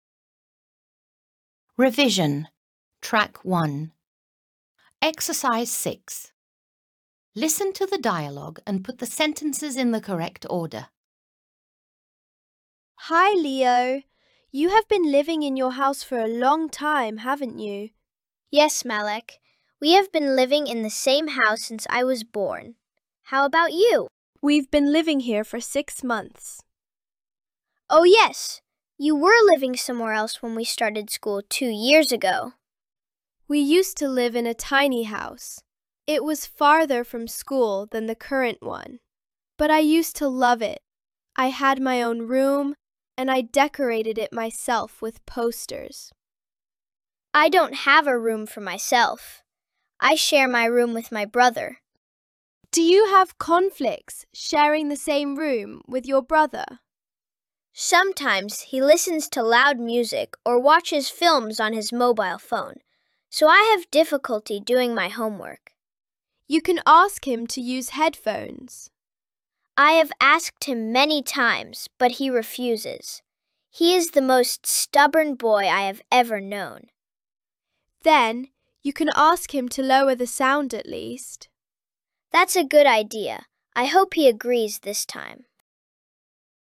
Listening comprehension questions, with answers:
7. Listen to the dialogue again and write T (True) or F (False). Correct the false statements.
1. Melek has been living in the same house since she was born.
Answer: F

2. Leo and Melek used to live in a tiny house.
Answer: F

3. Melek didn't use to have a room for herself.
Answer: F

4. Leo shares his room with his sister.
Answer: F

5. Melek thinks that Leo should ask his brother to use headphones.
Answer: T

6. Leo's brother is a stubborn boy.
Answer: T

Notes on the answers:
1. Melek has been living in the same house for six months. (Melek bu evde altı aydır yaşıyor.)
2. Melek used to live in a tiny house. (Melek eskiden minicik bir evde yaşardı.)
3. Melek used to have a room for herself. (Melek'in eskiden kendine ait bir odası vardı.)
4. Leo shares his room with his brother. (Leo, odasını erkek kardeşiyle paylaşıyor.)

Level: 7. Sınıf